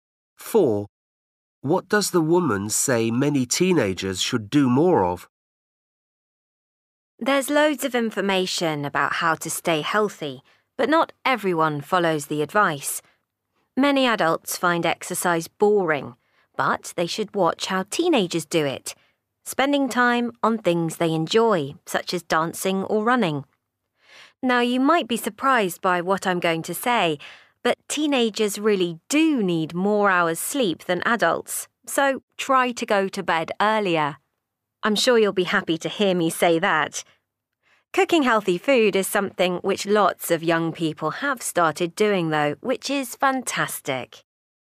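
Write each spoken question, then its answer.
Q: What does the woman say many teenagers should do more of?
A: sleep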